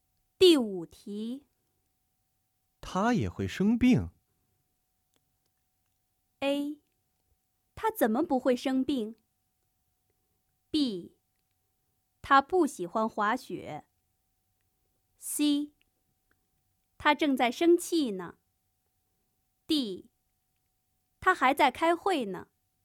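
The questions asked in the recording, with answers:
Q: 他也会生病?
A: A: 他怎么不会生病?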